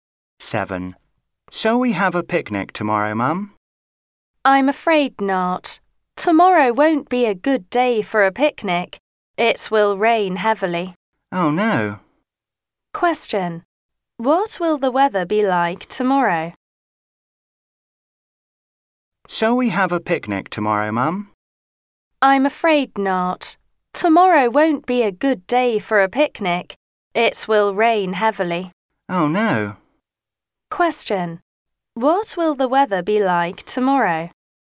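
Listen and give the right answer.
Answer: It will rain heavily.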